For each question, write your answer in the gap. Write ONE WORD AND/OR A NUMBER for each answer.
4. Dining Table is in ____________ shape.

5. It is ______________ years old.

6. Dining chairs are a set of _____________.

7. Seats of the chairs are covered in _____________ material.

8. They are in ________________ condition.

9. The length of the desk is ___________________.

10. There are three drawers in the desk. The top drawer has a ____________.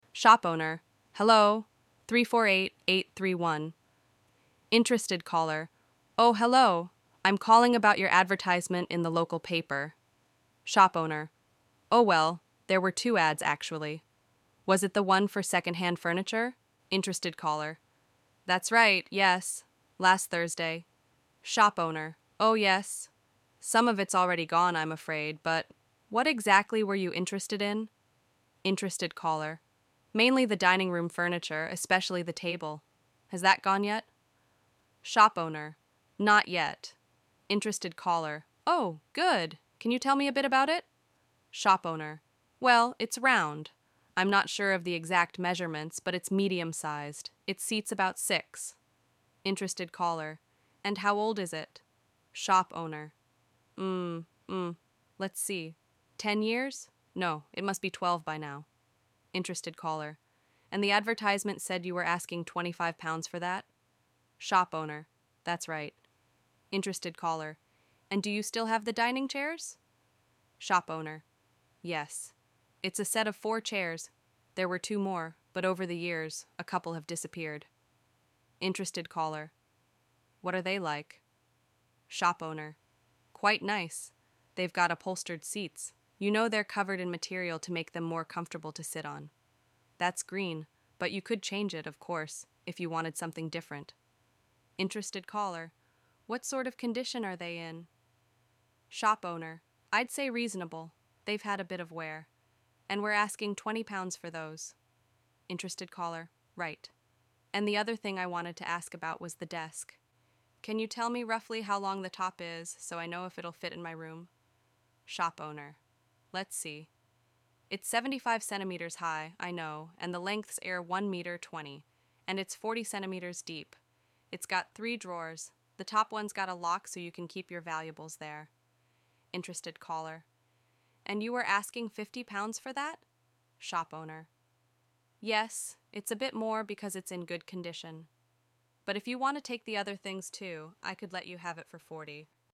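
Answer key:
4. round
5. 12
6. 4
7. green
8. reasonable
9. 1.20 meters
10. lock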